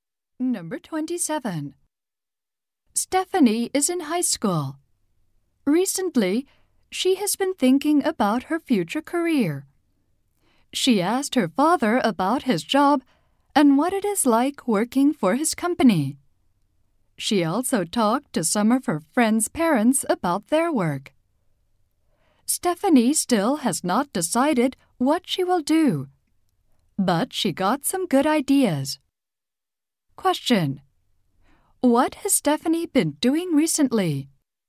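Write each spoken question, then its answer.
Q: Question. What has Stephanie been doing recently?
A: Asking people about their jobs.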